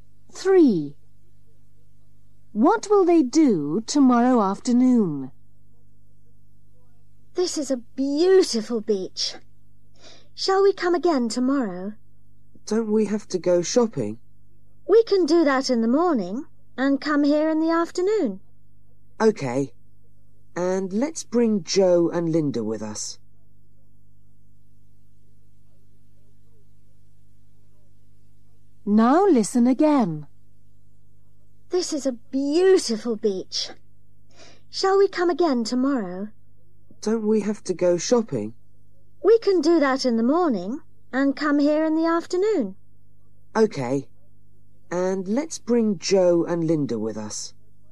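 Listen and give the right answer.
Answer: go to the beach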